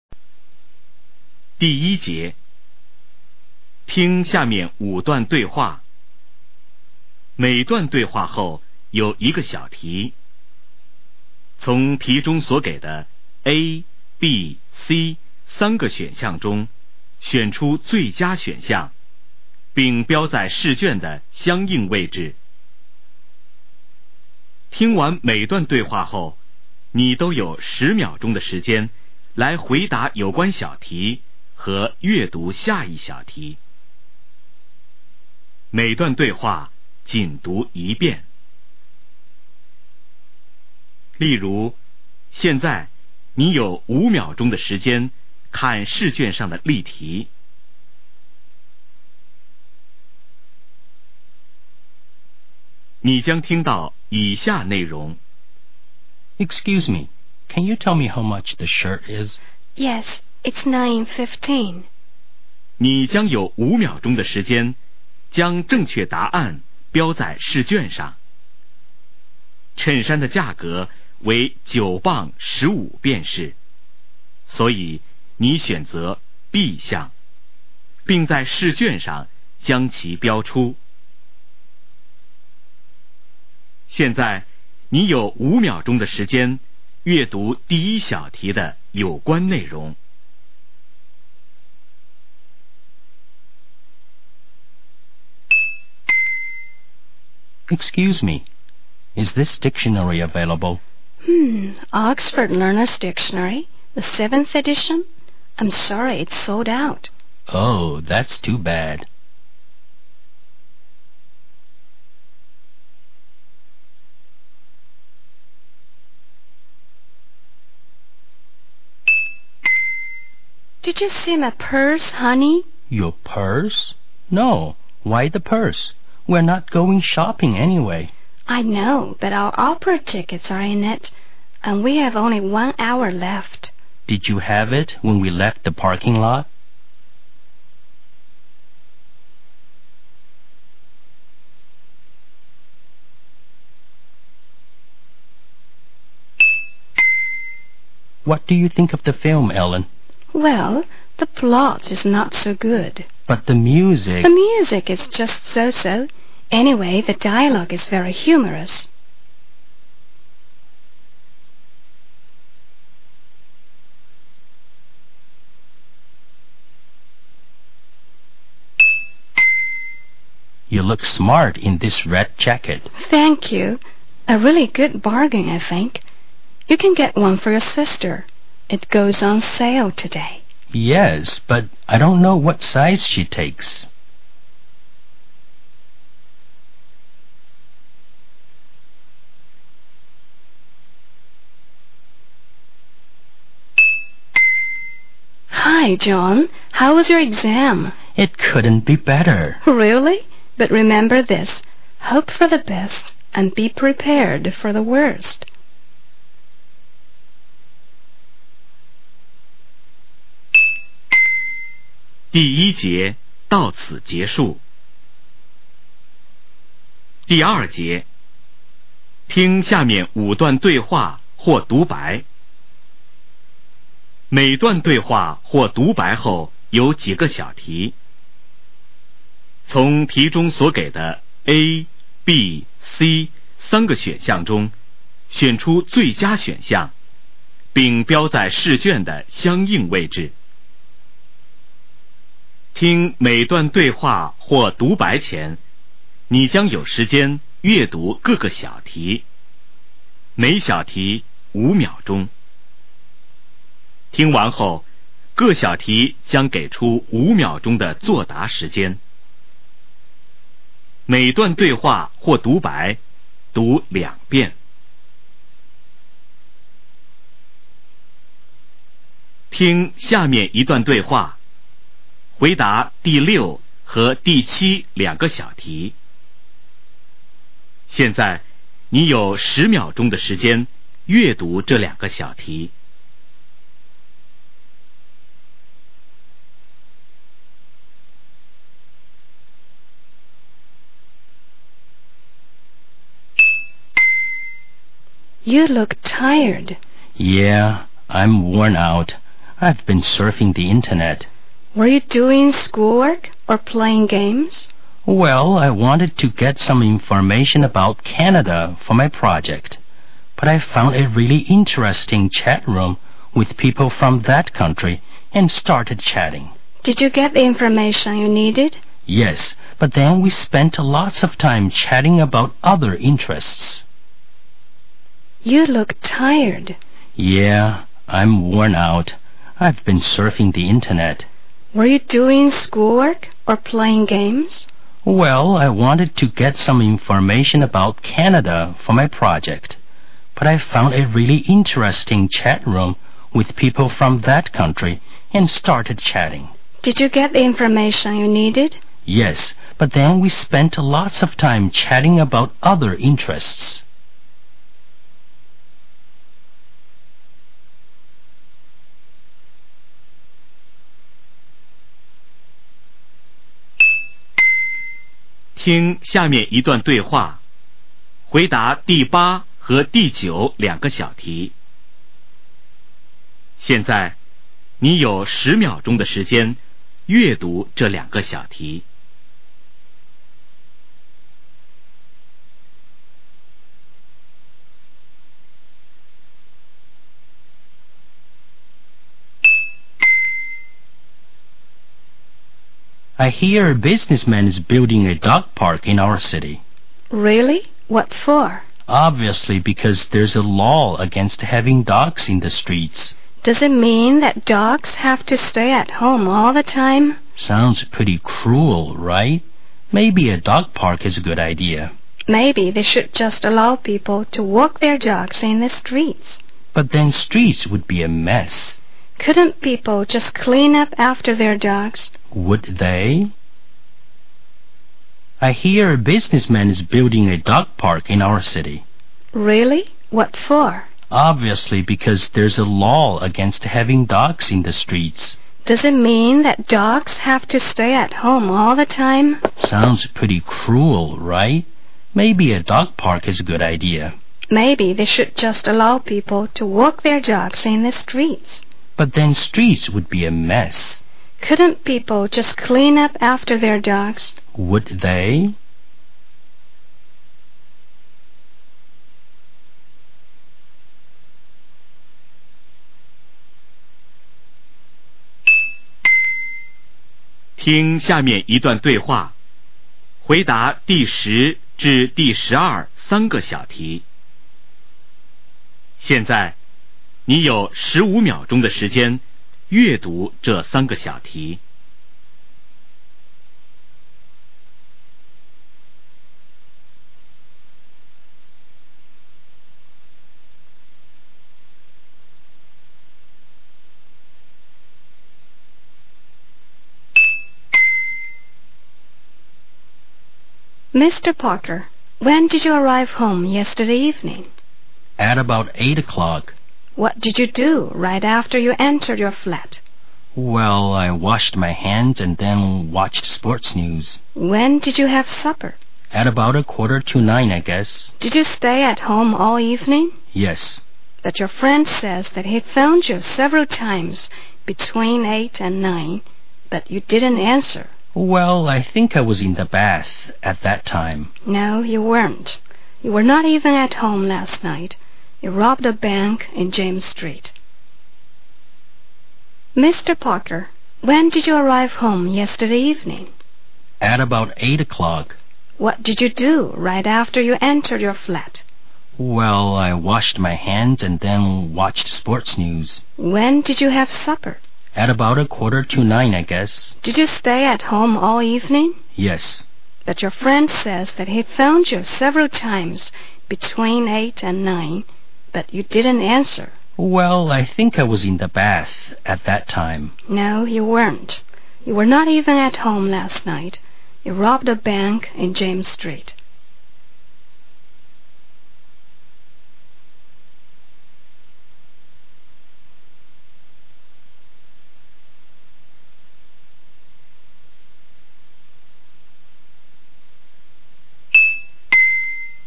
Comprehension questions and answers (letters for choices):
听下面5段对话。每段对话后有一个小题,从题中所给的A、B、C三个选项中选出最佳选项,并标在试卷的相应位置。听完每段对话后,你都有10秒钟的时间来回答有关小题和阅读下一小题。每段对话仅读一遍。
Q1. Where does the conversation most probably take place?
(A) In an office.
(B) In a library.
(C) In a bookstore.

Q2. Where did the speakers plan to go?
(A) A shopping center.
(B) An opera house.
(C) The parking lot.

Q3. Which aspect of the film does the woman like?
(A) The plot.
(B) The music.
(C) The dialogue.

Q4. What do we know about the woman's jacket?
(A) It is sold at a lower price.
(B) Its color is her favorite.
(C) It is her sister's size.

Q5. What does the woman imply?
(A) The man is so forgetful.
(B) The man is too careless.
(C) The man is over confident.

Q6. What makes the man so tired?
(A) Playing games.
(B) Surfing the Internet.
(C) Searching for interesting people.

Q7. Whom did the man chat with?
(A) People from Canada.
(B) People in need of his help.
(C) People on the same project.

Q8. What does the law forbid people to do?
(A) To take dogs to parks.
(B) To walk dogs in the streets.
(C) To treat dogs cruelly.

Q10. According to the man, what did he do before he watched TV?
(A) He washed his hands.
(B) He had his supper.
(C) He took a path.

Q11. What place had the man been to the night before?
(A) James Street.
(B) A restaurant.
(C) A friend's home.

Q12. What does the man try to do in the conversation?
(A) To prove the truth.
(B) To find the truth.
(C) To hide the truth.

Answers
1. C
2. B
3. C
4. A
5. C
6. B
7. A
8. B
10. A
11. A
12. C